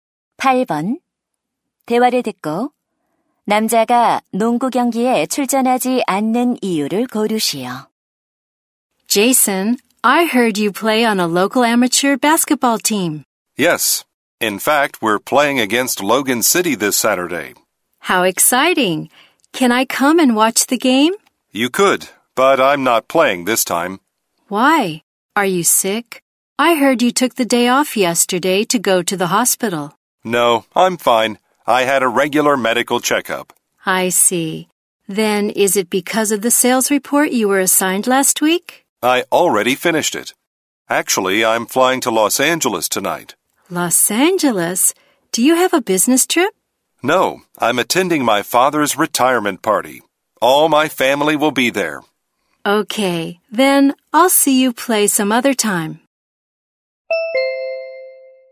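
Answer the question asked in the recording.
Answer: 아버지의 은퇴 파티에 참석해야 해서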